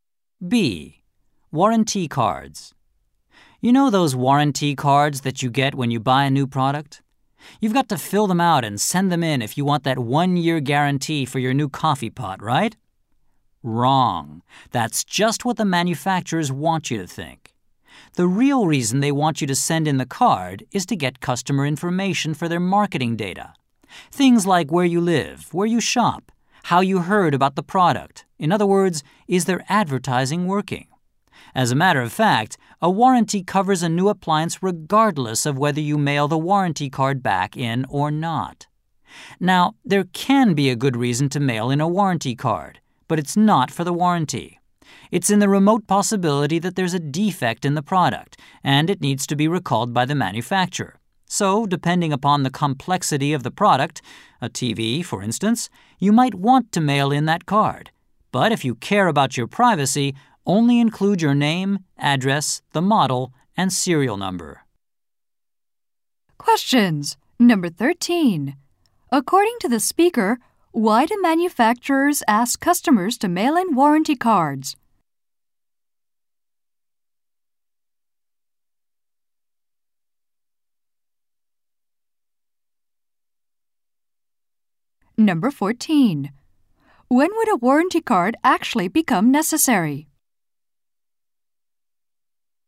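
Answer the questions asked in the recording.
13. To get customer information for their marketing data.
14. When a defective product needs to be recalled by the manufacturer.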